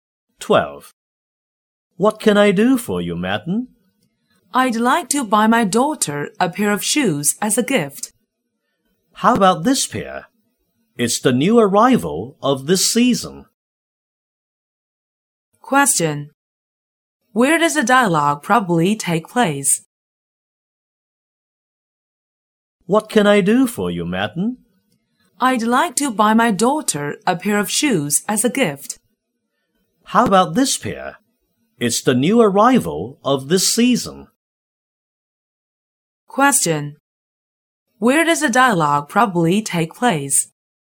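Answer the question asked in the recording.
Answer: In a shoe shop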